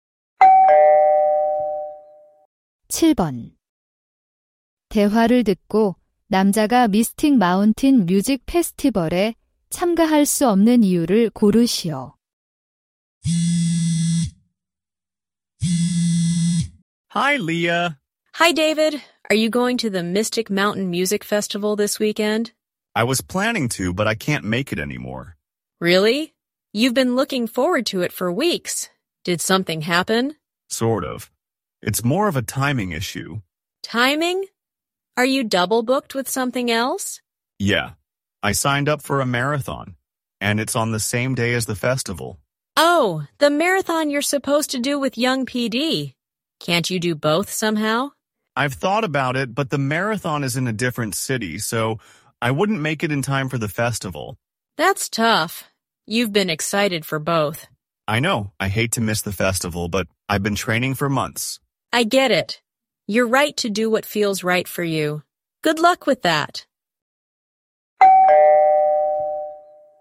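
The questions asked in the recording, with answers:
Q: 대화를 듣고 남자가 미스틱 마운틴 뮤직 페스티벌에 참가할 수 없는 이유를 고르시오.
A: 같은 날 다른 도시에서 열리는 마라톤에 참가해야 해서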